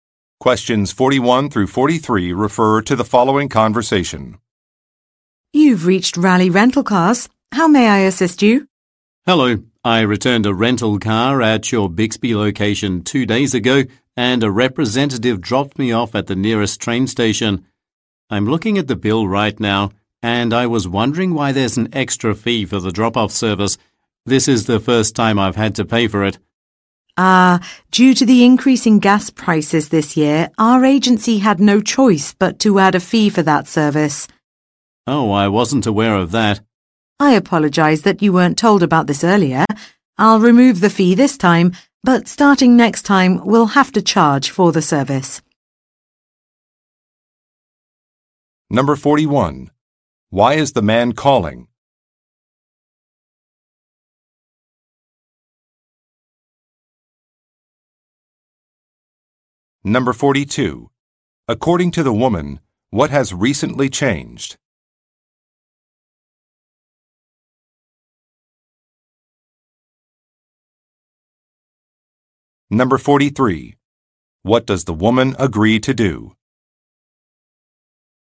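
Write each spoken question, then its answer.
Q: Why is the man calling?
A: To ask about an extra fee for the drop-off service on his bill

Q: According to the woman, what has recently changed?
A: Gas prices increased, so a fee was added for the drop-off service

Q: What does the woman agree to do?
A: Remove the fee this time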